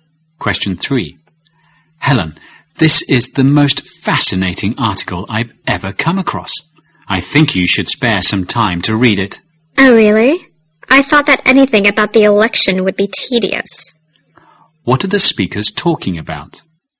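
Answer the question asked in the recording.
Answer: A fascinating article about the election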